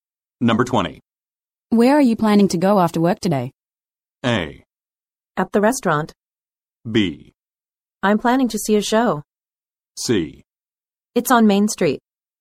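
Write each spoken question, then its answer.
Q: Where are you planning to go after work today?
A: B: I'm planning to see a show.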